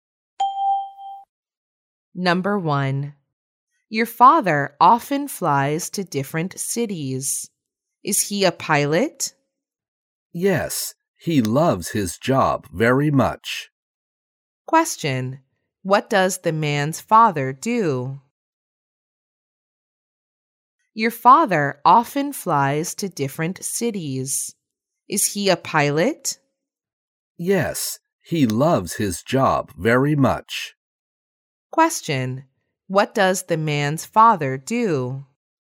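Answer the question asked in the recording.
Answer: He is a pilot.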